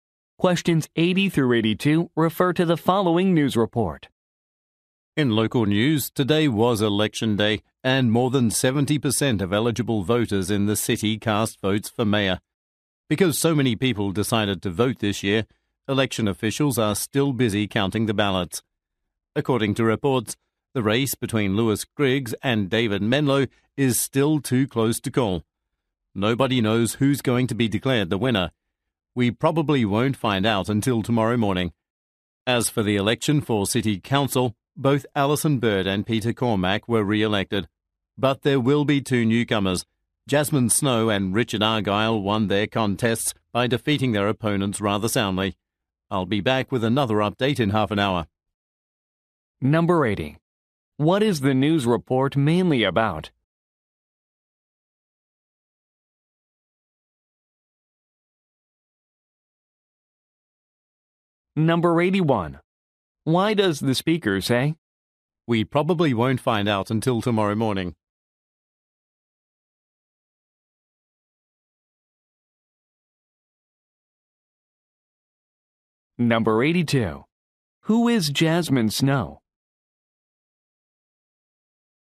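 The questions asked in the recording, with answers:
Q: What is the news report mainly about?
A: A local election

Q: Who is Jasmine Snow?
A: A newly elected city council member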